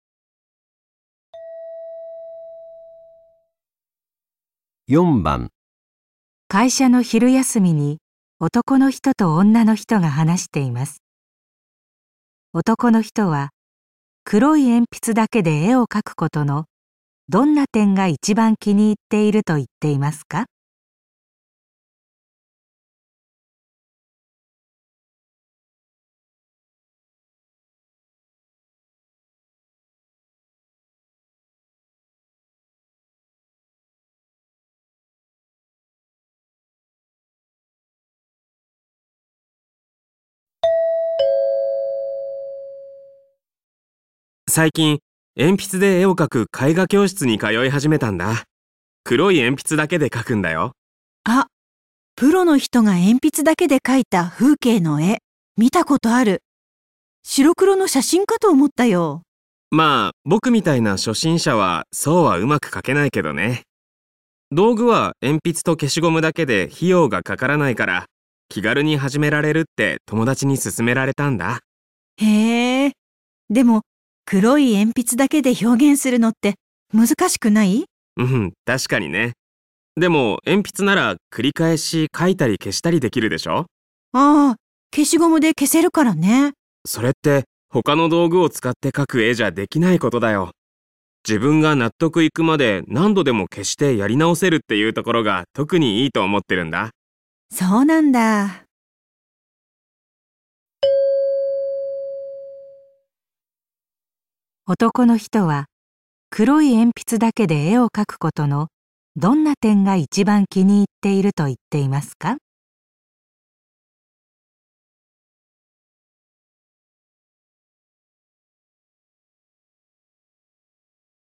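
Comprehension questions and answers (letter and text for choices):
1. 男の人は黒い鉛筆だけで絵を描くことのどんな点が一番気に入っていると言っていますか。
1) 写真のような絵が書けること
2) 初心者 でも早く上手になること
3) 費用がかからないこと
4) 消しゴムで消して書き直せること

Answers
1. 4) 消しゴムで消して書き直せること

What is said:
男:最近、鉛筆で絵を描く絵画教室に通い始めたんだあ。黒い鉛筆だけで描くんだよ。
女:あ、プロの人が鉛筆だけで書いた風景の絵見たことある。白黒の写真かと思ったよ。
男:まあ、僕みたいな初心者はそううまく描けないけどね。道具は鉛筆と消しゴムだけで、費用がかからないから、気軽に始められるって友達に勧められたんだ。
女:へえ。でも、黒い鉛筆だけで表現するのって、難しくない?
男:うん、確かにね!でも、鉛筆なら繰り返し、書いたり消したりできるでしょう。
女:あ、消しゴムで消せるからね。
男:それで、他の道具を使って描く絵じゃできないことだよ。自分が納得いくまで何度でも消してやり直せるっていうところが特にいいと思ってるんだ。
女:そうなんだ。

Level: N2 第3回】聴解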